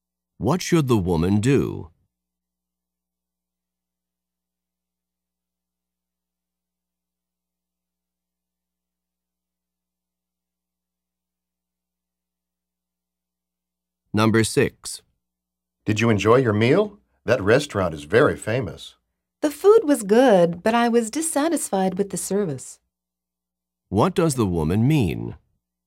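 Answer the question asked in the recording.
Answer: She liked the food but not the service.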